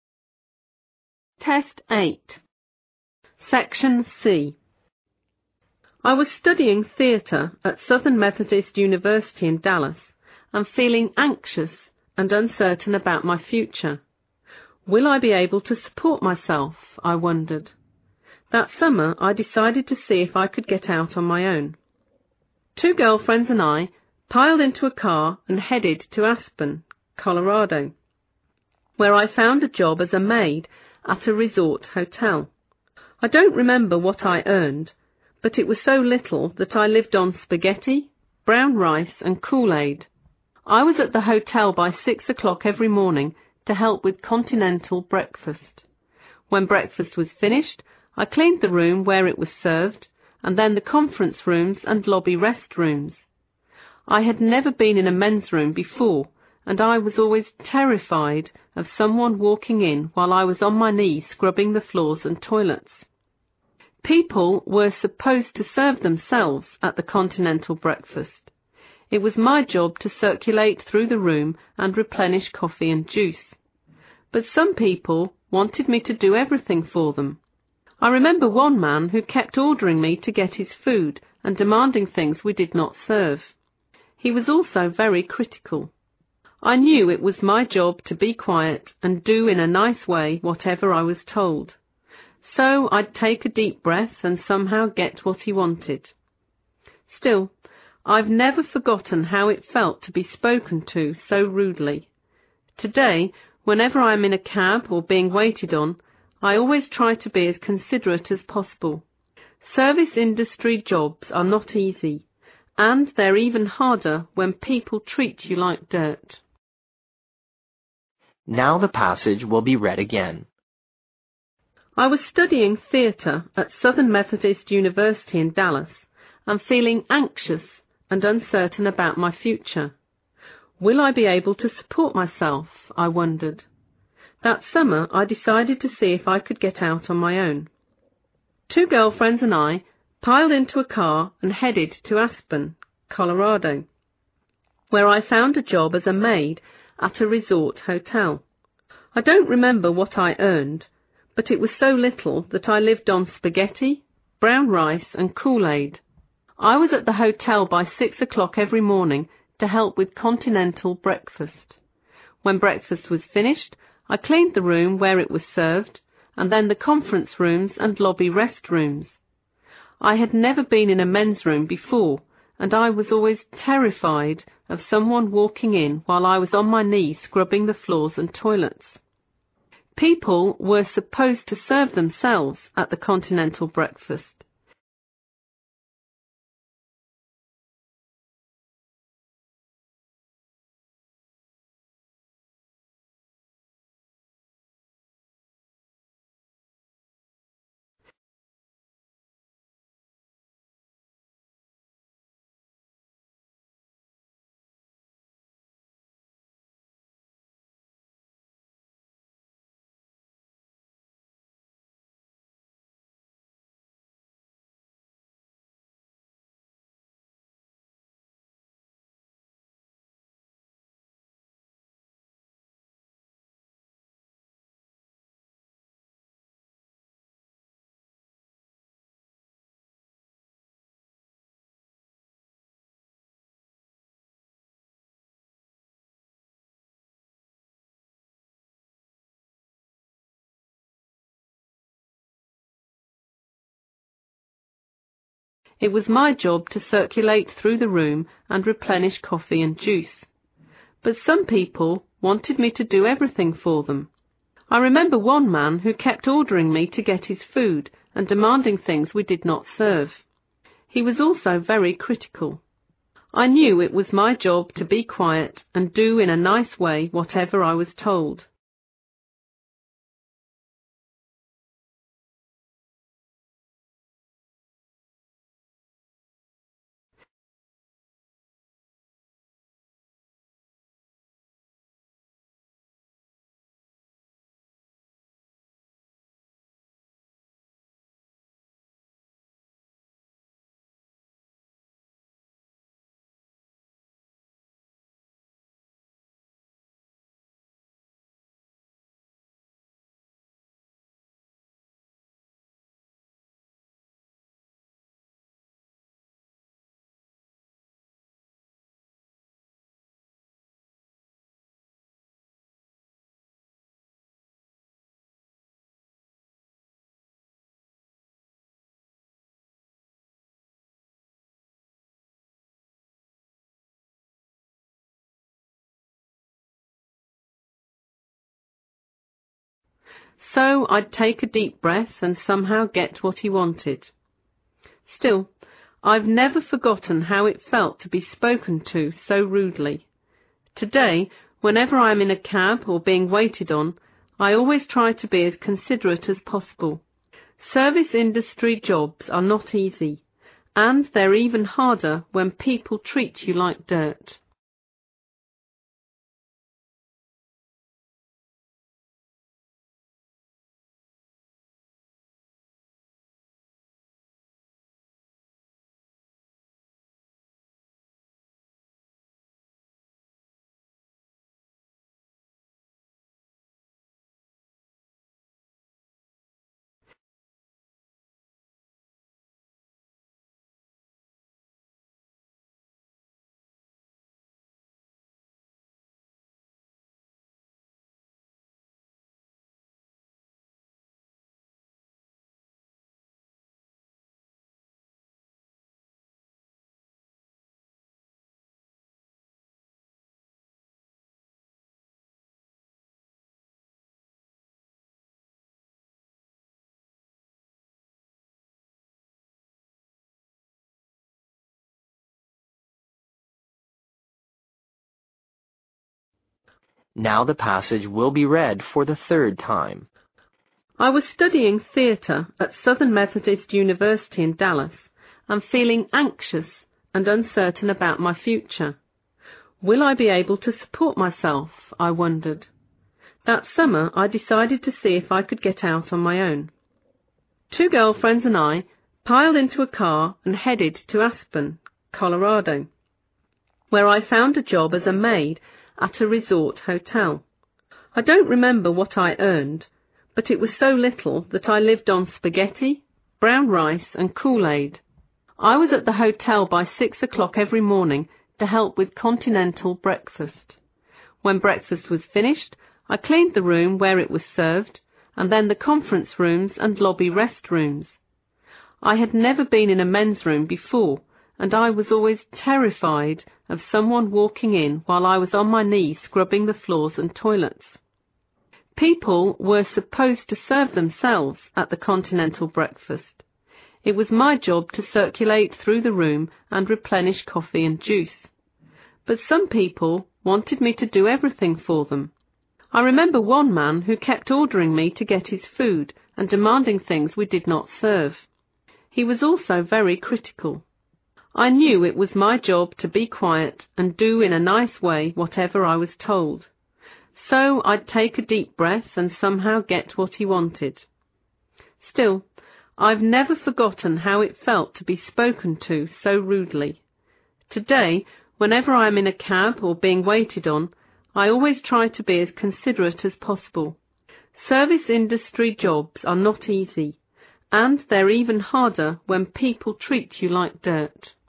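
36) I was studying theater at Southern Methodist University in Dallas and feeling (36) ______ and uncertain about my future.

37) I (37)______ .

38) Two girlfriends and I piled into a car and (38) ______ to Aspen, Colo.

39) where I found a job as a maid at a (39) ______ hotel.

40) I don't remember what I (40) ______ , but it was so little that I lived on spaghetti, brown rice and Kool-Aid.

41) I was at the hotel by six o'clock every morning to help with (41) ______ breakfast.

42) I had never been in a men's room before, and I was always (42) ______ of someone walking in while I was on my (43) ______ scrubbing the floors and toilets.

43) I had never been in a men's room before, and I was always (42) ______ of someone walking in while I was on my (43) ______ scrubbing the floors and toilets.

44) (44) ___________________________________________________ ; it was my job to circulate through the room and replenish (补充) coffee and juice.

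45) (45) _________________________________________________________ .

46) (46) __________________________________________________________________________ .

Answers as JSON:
{"36": "anxious", "37": "wondered", "38": "headed", "39": "resort", "40": "earned", "41": "continental", "42": "terrified", "43": "knees", "44": "People were supposed to serve themselves at the continental breakfast", "45": "I knew it was my job to be quiet and do in a nice way whatever I was told", "46": "Service industry jobs are not easy, and they're even harder when people treat you like dirt"}

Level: 四级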